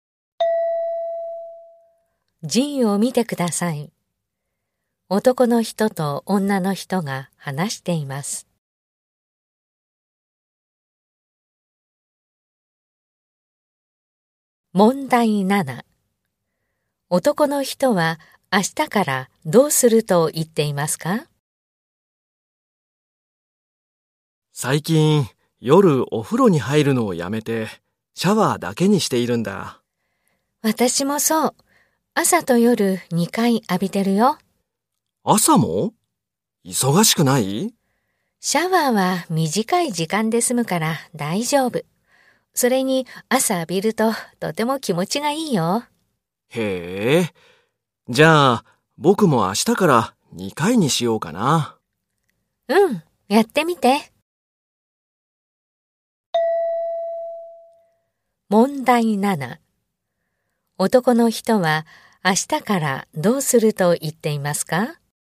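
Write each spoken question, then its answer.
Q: 男の人は明日からどうすると言っていますか?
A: 朝と夜2回シャワーを浴びる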